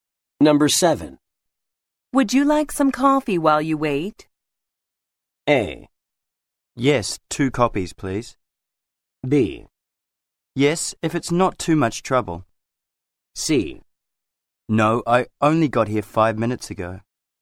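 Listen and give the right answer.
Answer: B: Yes, if it's not too much trouble.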